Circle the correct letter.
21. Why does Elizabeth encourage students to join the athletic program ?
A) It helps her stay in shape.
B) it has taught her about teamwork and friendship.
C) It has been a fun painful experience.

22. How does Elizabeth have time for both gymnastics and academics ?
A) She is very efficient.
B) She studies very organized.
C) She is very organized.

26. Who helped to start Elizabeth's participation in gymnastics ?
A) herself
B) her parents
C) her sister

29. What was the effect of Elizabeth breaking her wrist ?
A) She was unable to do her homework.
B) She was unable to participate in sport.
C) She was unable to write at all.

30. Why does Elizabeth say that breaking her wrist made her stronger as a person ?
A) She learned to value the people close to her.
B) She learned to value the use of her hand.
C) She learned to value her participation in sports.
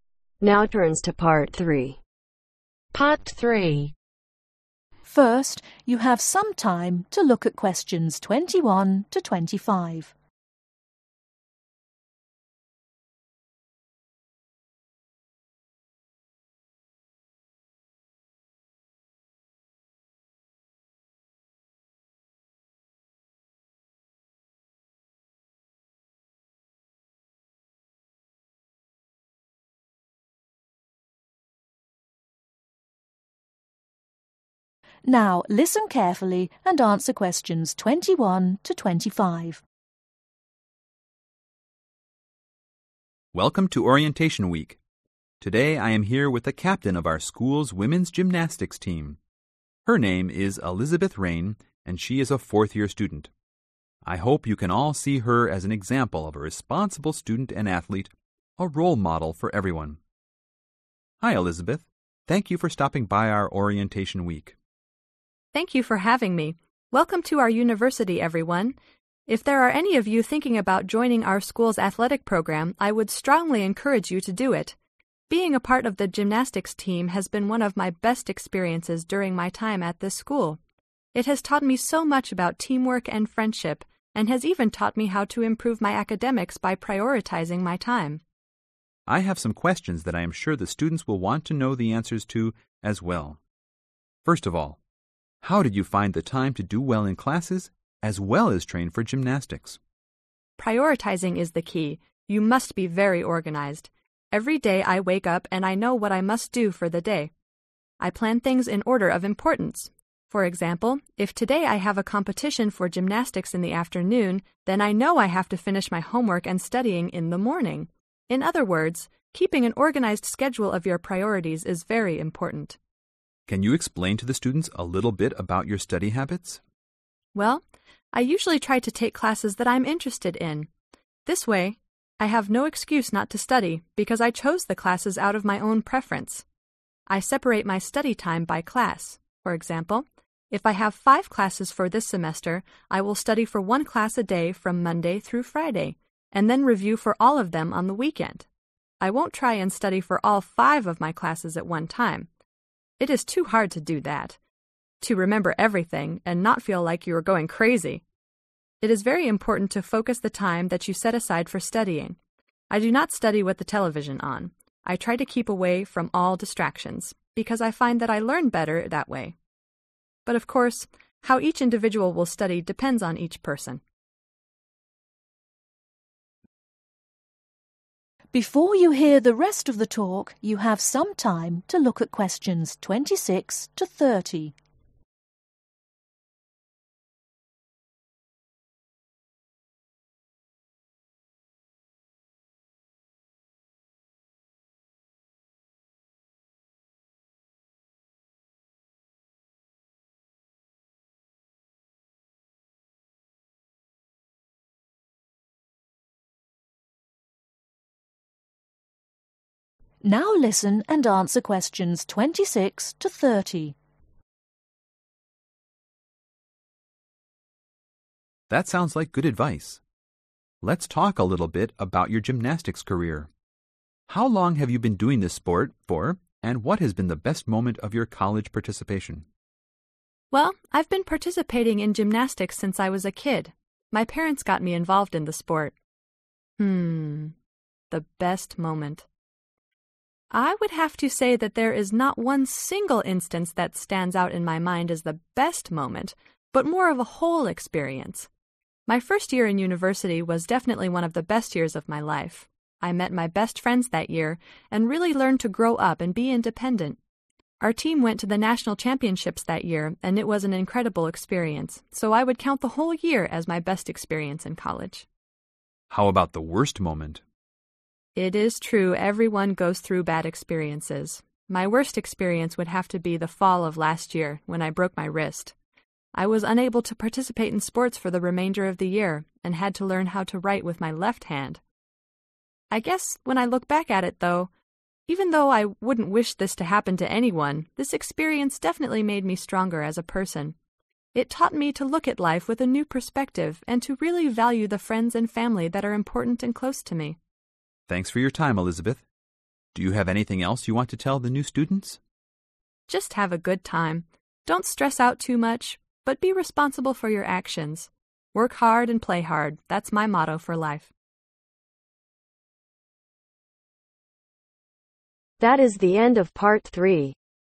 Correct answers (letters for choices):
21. B
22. C
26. B
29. B
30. A